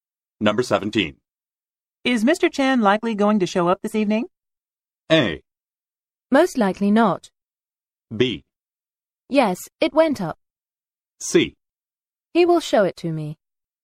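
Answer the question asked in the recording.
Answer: A: Most likely not.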